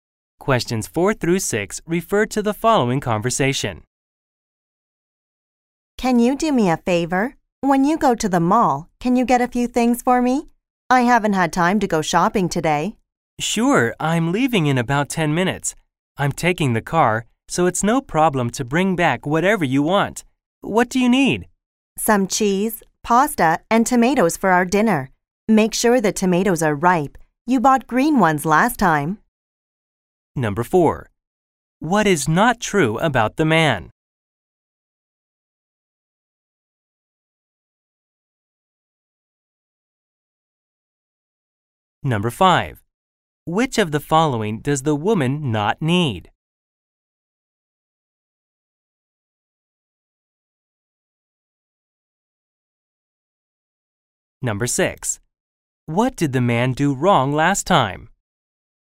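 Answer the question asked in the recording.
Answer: He bought green (unripe) tomatoes.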